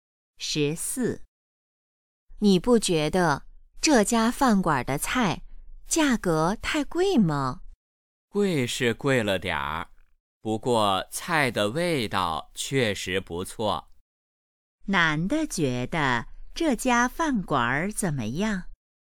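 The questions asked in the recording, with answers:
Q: 男的觉得这家饭馆怎么样?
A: 有点贵,但菜味道不错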